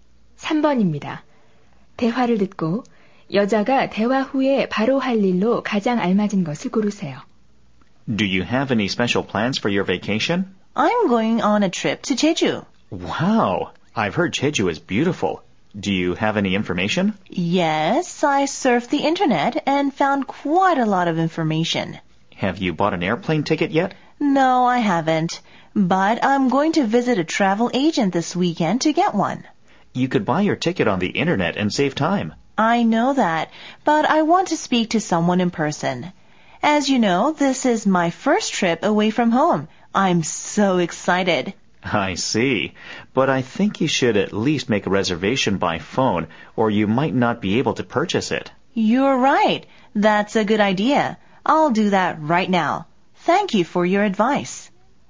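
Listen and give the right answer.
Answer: 전화로 비행기표 예약하기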